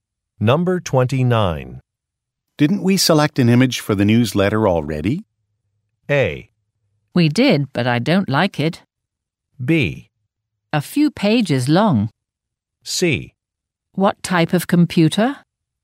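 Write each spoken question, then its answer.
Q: Didn't we select an image for the newsletter already?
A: A: We did, but I don't like it.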